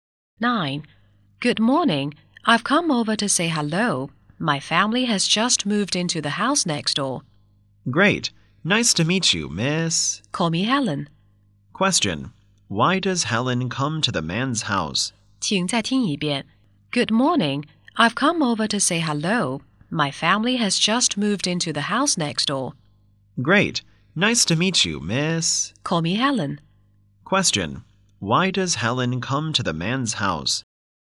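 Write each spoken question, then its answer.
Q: Question. Why does Helen come to the man's house?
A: To say hello as his new neighbour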